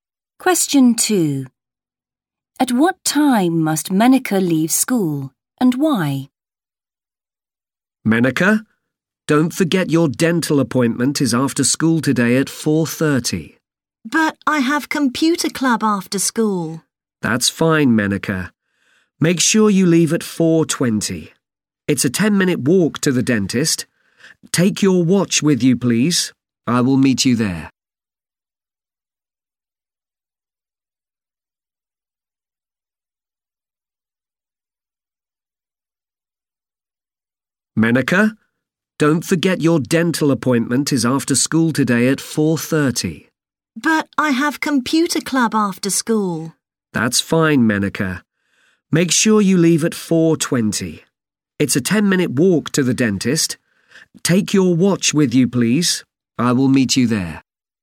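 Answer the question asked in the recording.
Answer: At 4:20, because she has a dental appointment at 4:30 and it's a 10-minute walk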